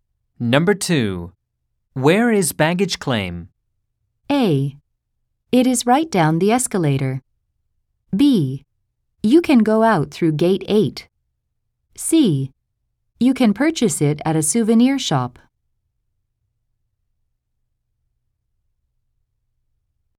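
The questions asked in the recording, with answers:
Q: Where is baggage claim?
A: A: It is right down the escalator.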